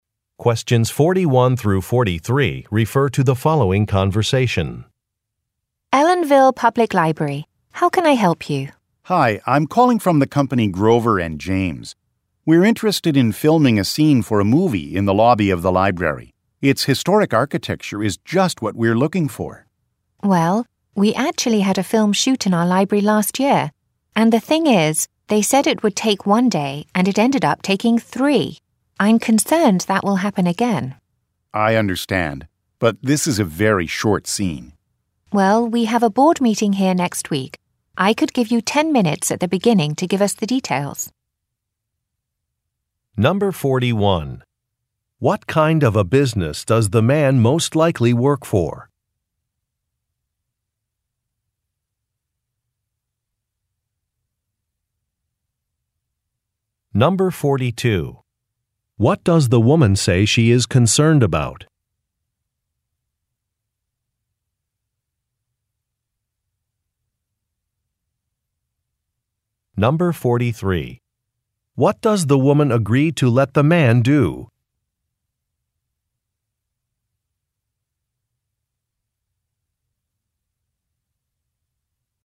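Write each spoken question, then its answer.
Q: What kind of a business does the man most likely work for?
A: A film production company

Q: What does the woman say she is concerned about?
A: That the filming will take longer than planned

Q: What does the woman agree to let the man do?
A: Present the details at the start of next week's board meeting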